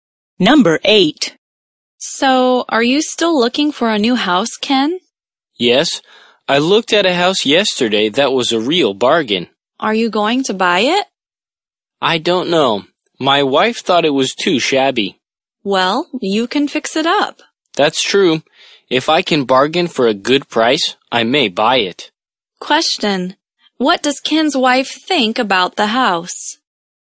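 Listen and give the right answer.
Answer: It is too shabby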